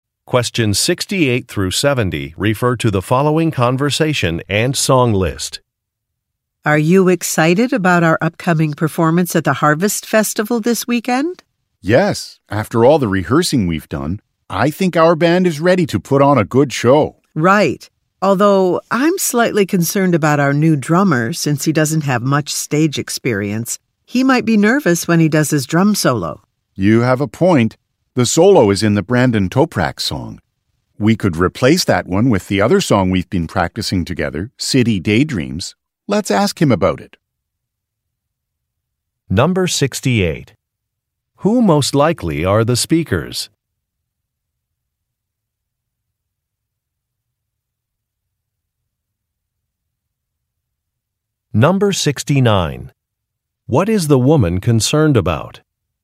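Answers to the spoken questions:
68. Band members (musicians)
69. The new drummer lacks stage experience and may be nervous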